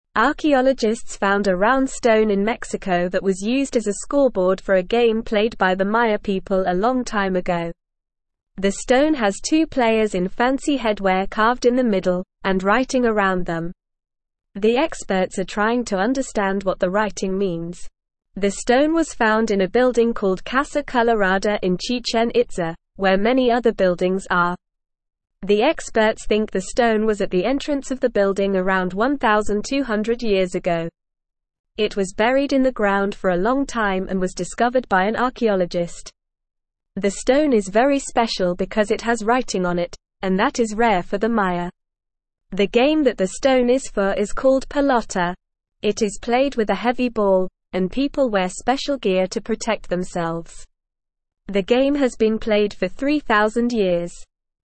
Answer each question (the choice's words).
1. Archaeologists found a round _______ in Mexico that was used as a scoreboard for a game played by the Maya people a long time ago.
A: stone

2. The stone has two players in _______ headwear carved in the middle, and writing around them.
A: fancy

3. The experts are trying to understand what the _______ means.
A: writing

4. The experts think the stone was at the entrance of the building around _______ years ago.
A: 1,200

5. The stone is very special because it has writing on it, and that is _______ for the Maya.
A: rare

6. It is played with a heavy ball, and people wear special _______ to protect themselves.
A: gear

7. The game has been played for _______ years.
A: 3,000

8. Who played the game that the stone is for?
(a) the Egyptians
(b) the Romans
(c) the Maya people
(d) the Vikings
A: the Maya people

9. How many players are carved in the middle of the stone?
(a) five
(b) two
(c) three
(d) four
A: two

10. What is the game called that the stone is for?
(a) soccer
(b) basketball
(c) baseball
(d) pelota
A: pelota

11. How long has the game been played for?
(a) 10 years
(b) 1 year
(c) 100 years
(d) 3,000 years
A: 3,000 years

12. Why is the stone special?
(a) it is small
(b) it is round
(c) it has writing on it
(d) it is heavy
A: it has writing on it

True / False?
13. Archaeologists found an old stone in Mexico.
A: True

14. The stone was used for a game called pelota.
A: True

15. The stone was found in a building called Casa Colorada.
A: True

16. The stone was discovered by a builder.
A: False

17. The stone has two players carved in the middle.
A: True

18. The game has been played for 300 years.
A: False

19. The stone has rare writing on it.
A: True

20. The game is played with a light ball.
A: False

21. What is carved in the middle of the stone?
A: Two players in fancy headwear are carved in the middle of the stone.

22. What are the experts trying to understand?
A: The experts are trying to understand what the writing around the players means.

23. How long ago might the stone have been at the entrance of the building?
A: The stone might have been at the entrance of the building around 1,200 years ago.

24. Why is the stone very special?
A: The stone is very special because it has writing on it, and that is rare for the Maya.

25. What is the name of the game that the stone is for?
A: The game that the stone is for is called pelota.

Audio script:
Archaeologists found a round stone in Mexico that was used as a scoreboard for a game played by the Maya people a long time ago. The stone has two players in fancy headwear carved in the middle, and writing around them. The experts are trying to understand what the writing means. The stone was found in a building called Casa Colorada in Chichen Itza, where many other buildings are. The experts think the stone was at the entrance of the building around 1,200 years ago. It was buried in the ground for a long time and was discovered by an archaeologist. The stone is very special because it has writing on it, and that is rare for the Maya. The game that the stone is for is called pelota. It is played with a heavy ball, and people wear special gear to protect themselves. The game has been played for 3,000 years.

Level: Level 1